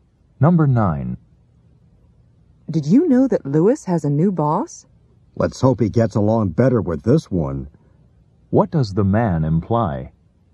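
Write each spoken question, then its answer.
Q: What does the man imply?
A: Lewis didn't get along well with his old boss.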